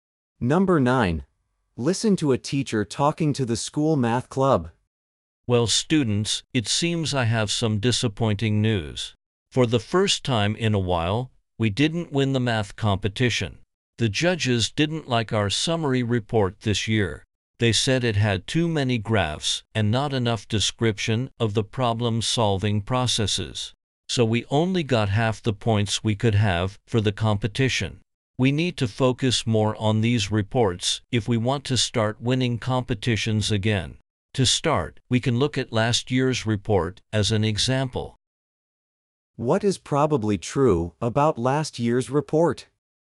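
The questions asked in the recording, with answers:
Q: What is probably true about last year's report?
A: It described the problem-solving processes better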